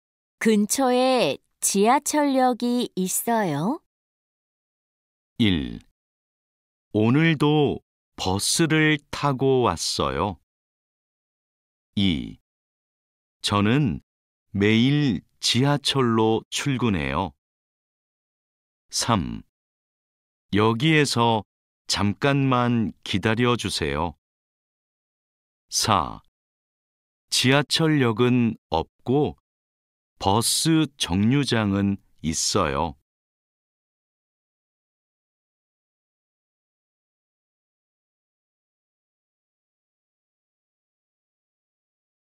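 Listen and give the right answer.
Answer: 4: 지하철역은 없고 버스 정류장은 있어요.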